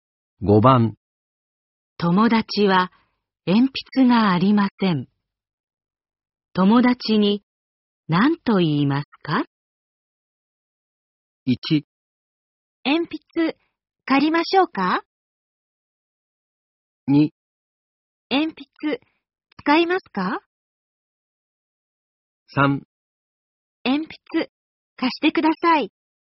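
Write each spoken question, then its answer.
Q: 友達は鉛筆がありません。友達に何と言いますか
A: 2: 鉛筆使いますか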